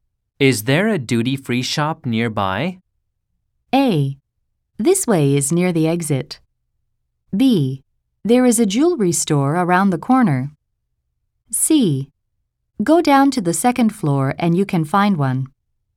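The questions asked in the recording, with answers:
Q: Is there a duty-free shop nearby?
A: C: Go down to the second floor and you can find one.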